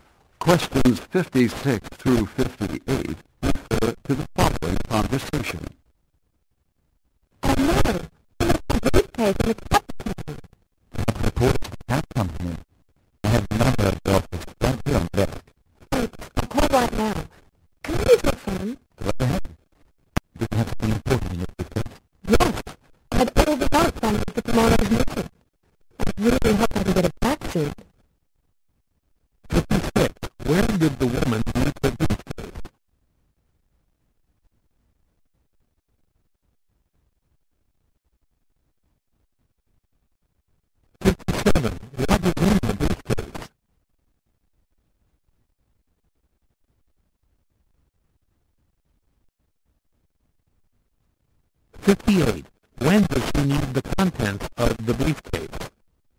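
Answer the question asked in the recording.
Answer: Tomorrow, for the meeting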